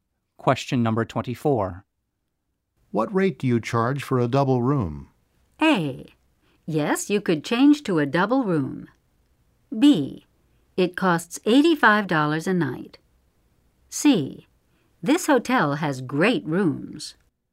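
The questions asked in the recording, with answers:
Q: What rate do you charge for a double room?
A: B: It costs $85 a night.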